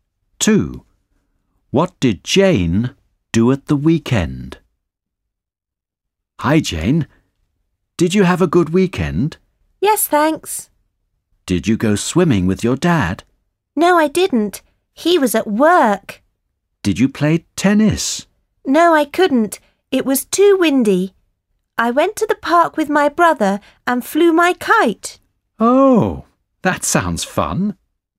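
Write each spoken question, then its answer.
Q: What did Jane do at the weekend?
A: She flew her kite in the park.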